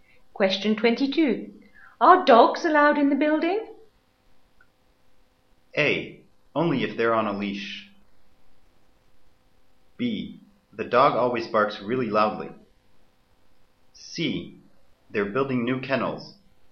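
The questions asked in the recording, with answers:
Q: Are dogs allowed in the building?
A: A: Only if they're on a leash.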